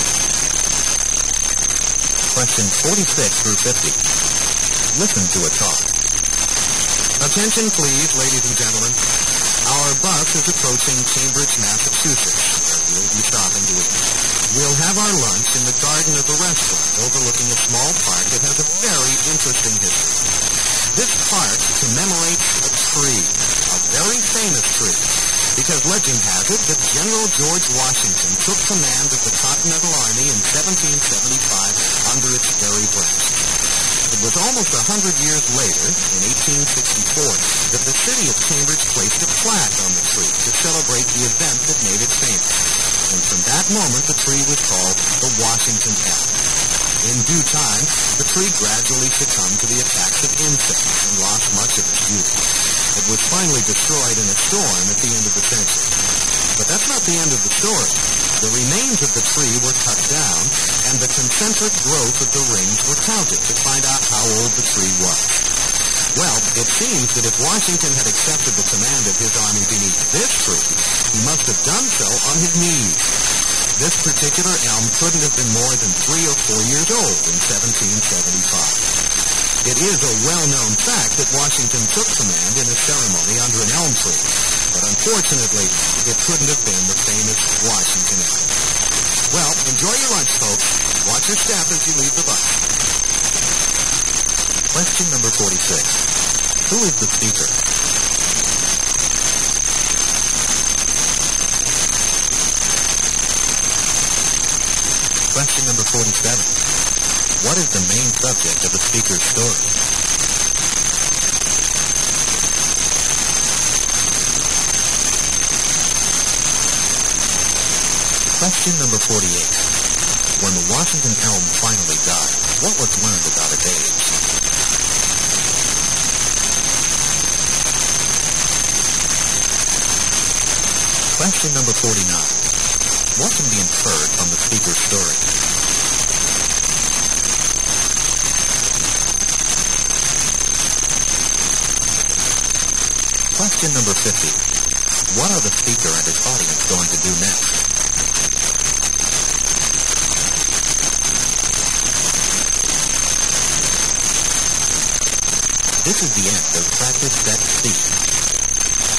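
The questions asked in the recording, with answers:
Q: Who is the speaker?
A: A tour bus guide

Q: What is the main subject of the speaker's story?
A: The Washington Elm

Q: When the Washington Elm finally died, what was learned about its age?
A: It could not have been more than 3 or 4 years old in 1775

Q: What can be inferred from the speaker's story?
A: Washington did not take command under the Washington Elm

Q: What are the speaker and his audience going to do next?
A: Have lunch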